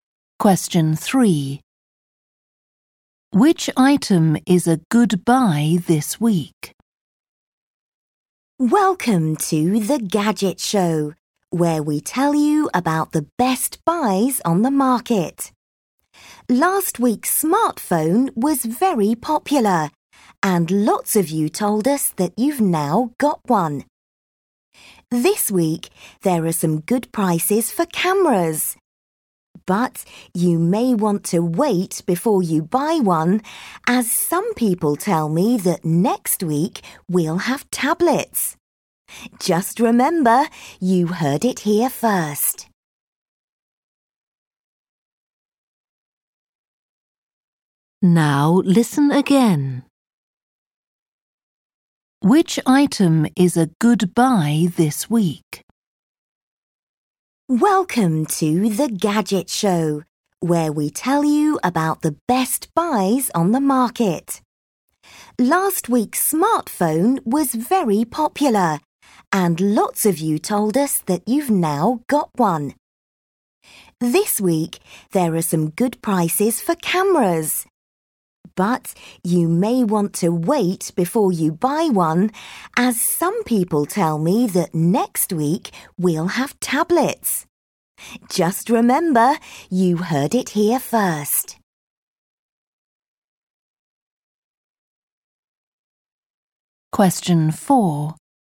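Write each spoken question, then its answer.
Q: Which item is a good buy this week?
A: Cameras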